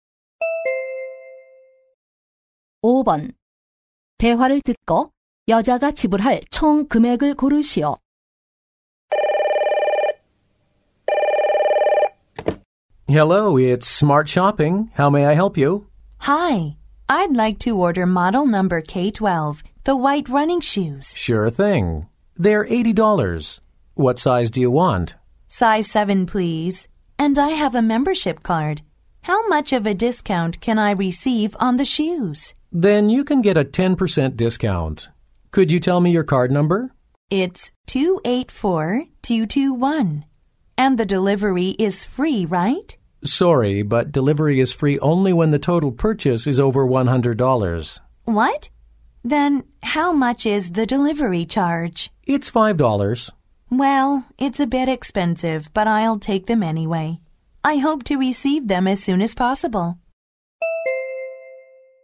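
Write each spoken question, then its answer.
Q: 대화를 듣고 여자가 지불할 총 금액을 고르시오.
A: 77달러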